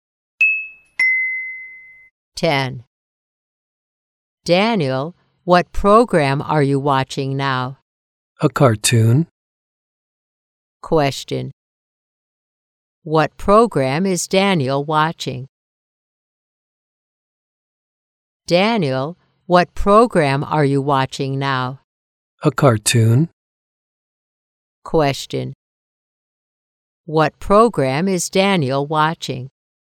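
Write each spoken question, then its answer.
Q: What program is Daniel watching?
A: A cartoon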